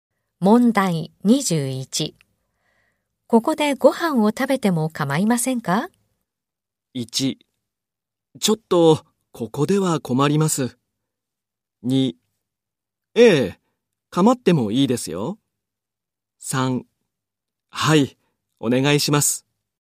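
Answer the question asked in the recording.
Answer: 1: ちょっとここでは困ります。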